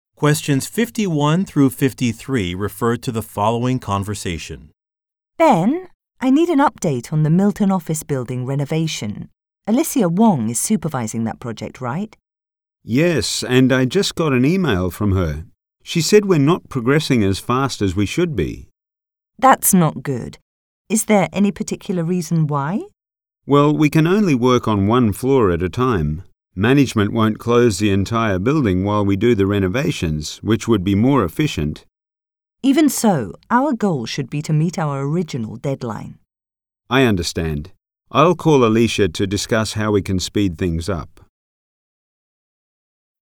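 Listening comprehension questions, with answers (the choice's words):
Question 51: Who is Ms. Wong?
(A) A building manager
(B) A project leader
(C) An architect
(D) A magazine writer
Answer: A project leader

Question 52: What is the woman concerned about?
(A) The status of a project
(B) Damage to a building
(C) A lack of workers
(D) The cost of materials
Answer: The status of a project

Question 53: What will the man probably do next?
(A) Visit a work-site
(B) Finish a report sooner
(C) Change a deadline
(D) Contact a colleague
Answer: Contact a colleague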